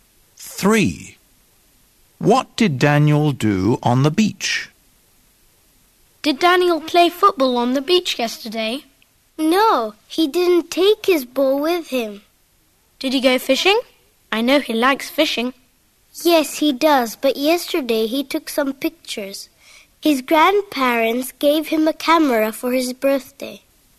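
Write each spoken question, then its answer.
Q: What did Daniel do on the beach?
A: He took some pictures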